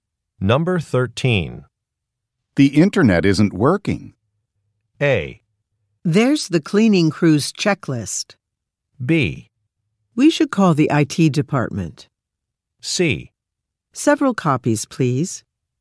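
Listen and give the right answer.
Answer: B: We should call the IT department.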